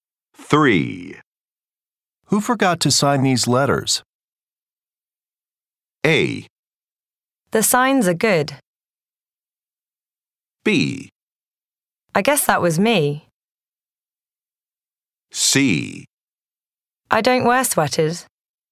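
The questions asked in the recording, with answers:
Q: Who forgot to sign these letters?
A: B: I guess that was me.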